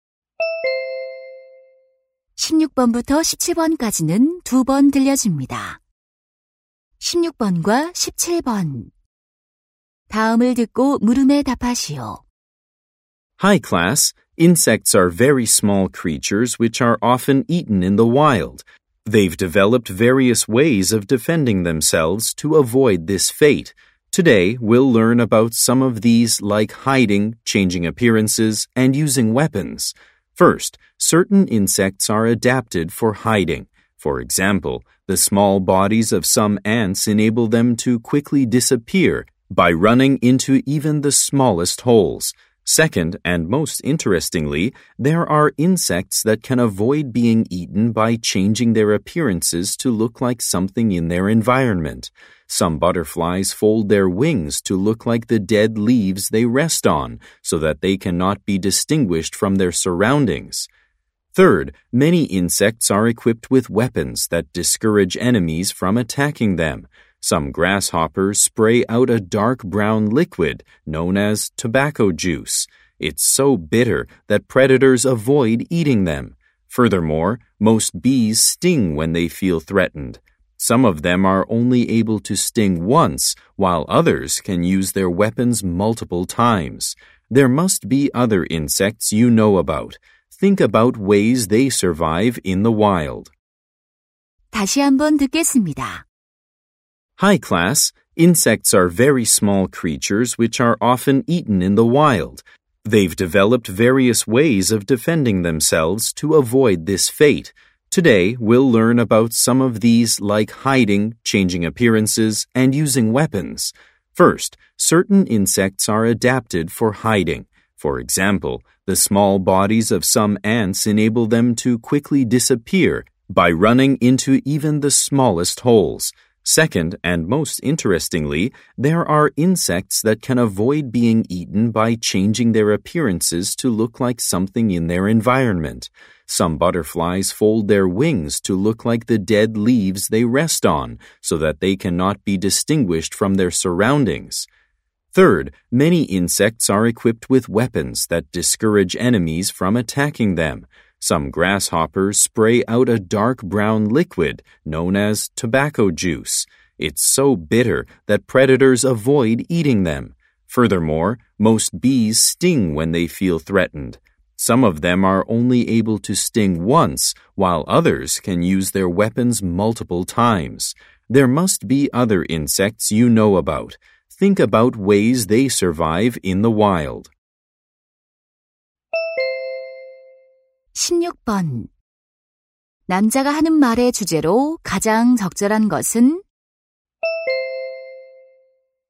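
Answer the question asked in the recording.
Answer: 곤충이 스스로를 방어하는 다양한 방법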